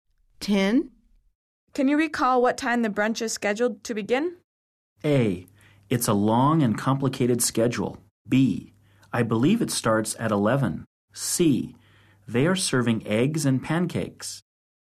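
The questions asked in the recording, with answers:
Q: Can you recall what time the brunch is scheduled to begin?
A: B: I believe it starts at 11.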